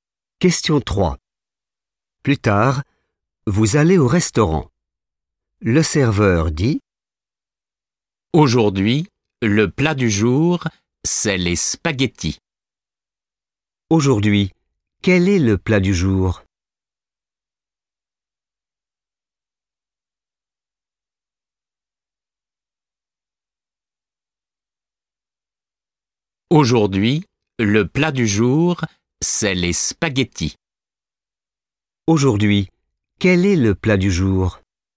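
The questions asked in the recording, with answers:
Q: Aujourd'hui, quel est le plat du jour?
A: les spaghettis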